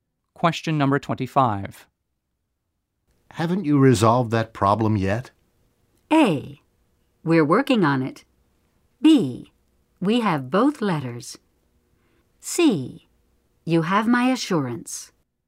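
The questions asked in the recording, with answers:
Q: Haven't you resolved that problem yet?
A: A: We're working on it.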